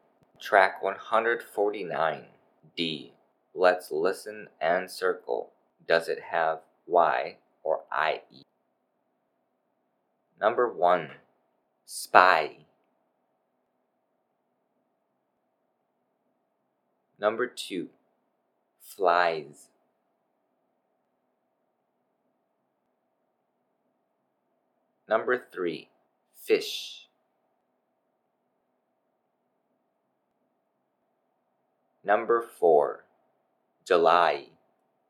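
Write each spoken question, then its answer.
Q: Number 2. Flies.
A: IE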